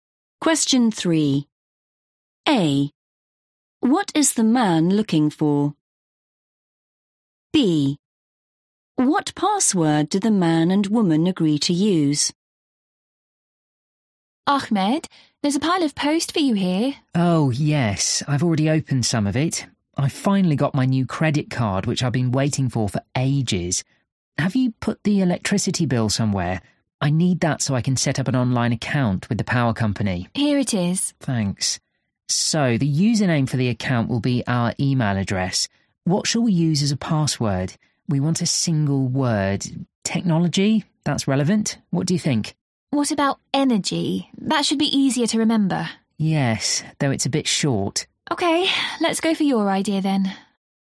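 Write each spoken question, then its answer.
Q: What is the man looking for?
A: the electricity bill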